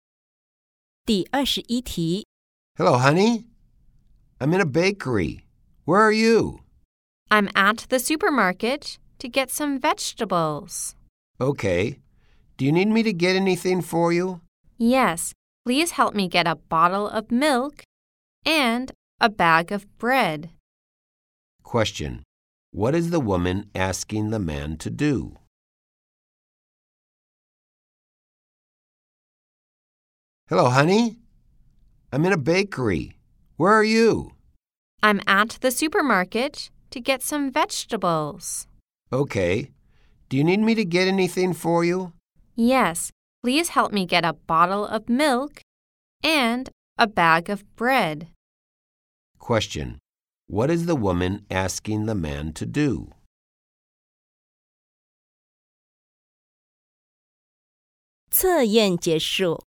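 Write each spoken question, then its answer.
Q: Question: What is the woman asking the man to do?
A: Get a bottle of milk and a bag of bread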